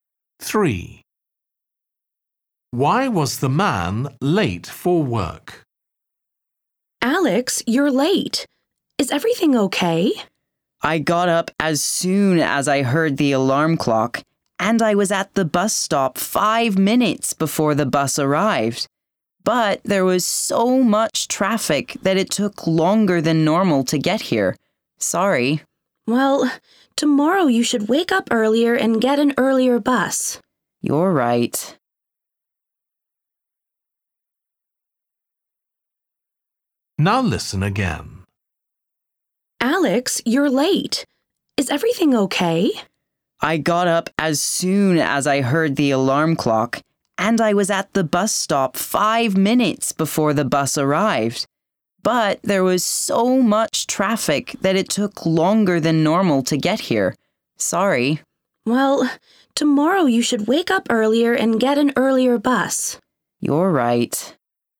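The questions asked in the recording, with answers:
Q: Why was the man late for work?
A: there was a lot of traffic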